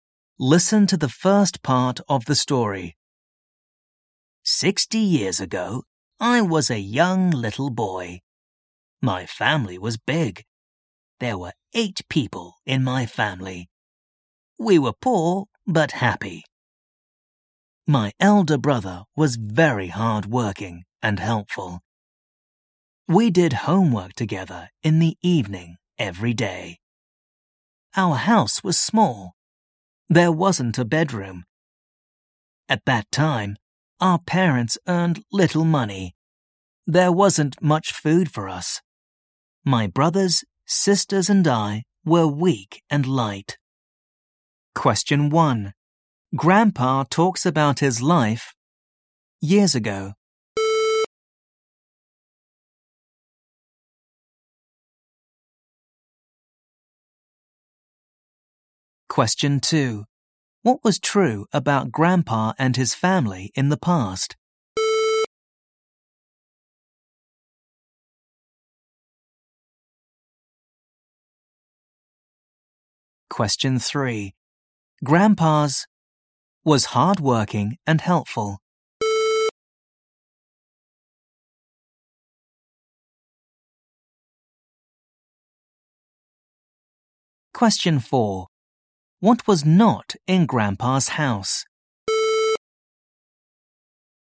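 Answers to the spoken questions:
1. 60
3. elder brother
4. A bedroom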